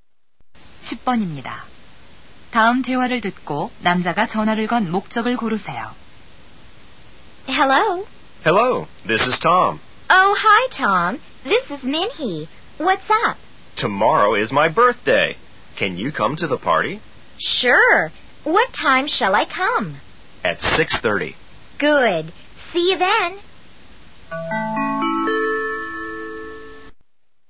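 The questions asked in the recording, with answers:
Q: 다음 대화를 듣고 남자가 전화를 건 목적을 고르세요.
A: 생일 파티에 초대하려고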